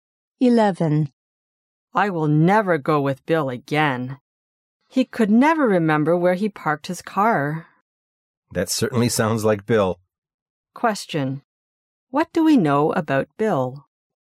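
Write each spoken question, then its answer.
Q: What do we know about Bill?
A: He often forgets where he parked his car.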